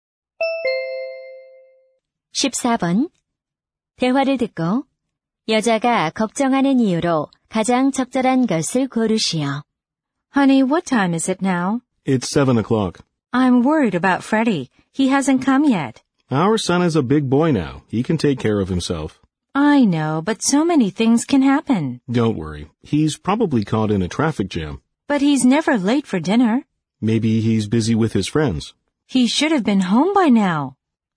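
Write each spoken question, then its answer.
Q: 대화를 듣고 여자가 걱정하는 이유로 가장 적절한 것을 고르시오.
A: 아들이 아직 집에 오지 않아서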